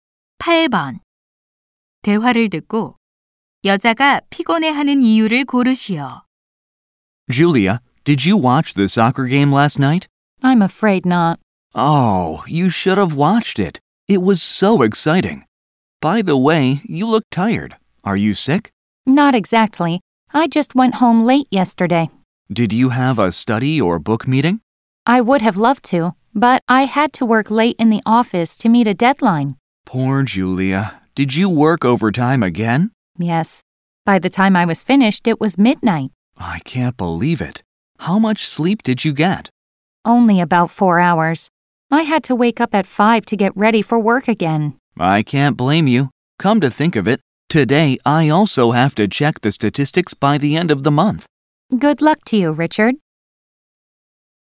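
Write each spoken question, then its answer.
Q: 대화를 듣고 여자가 피곤해하는 이유를 고르시오.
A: 마감을 맞추려고 밤늦게까지 야근해서 잠을 거의 못 잤기 때문에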